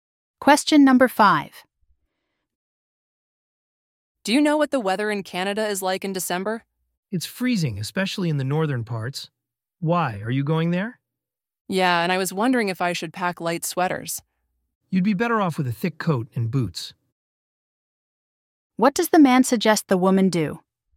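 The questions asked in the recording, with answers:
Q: What does the man suggest the woman do?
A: Pack a thick coat and boots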